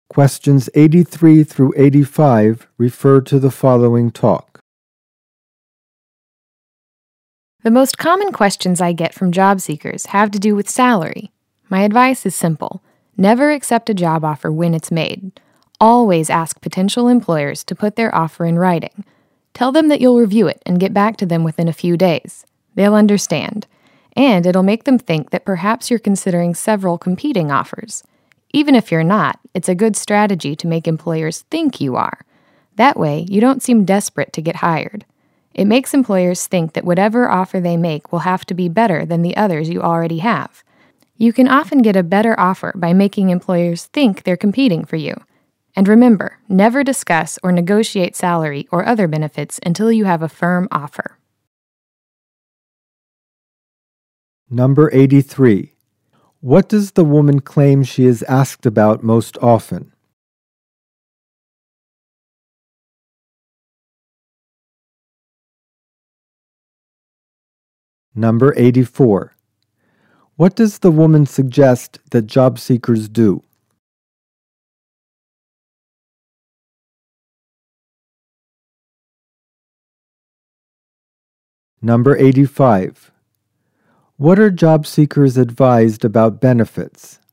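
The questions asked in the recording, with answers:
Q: What does the woman claim she is asked about most often?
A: Salary

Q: What does the woman suggest that job seekers do?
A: Ask employers to put job offers in writing and not accept right away

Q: What are job seekers advised about benefits?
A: Not to discuss or negotiate them until they have a firm offer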